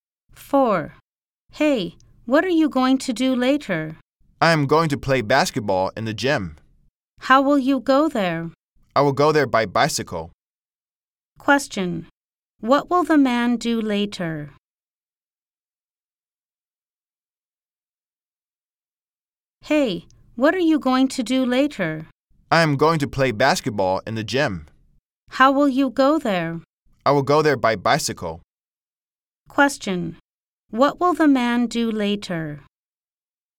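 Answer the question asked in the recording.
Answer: Play basketball in the gym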